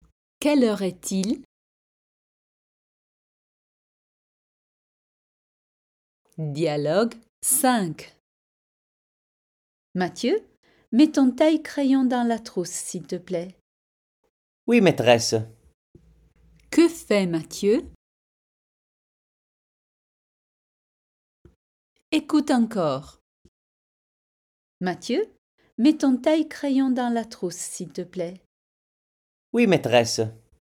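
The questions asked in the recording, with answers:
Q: Que fait Mathieu?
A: Il met son taille-crayon dans la trousse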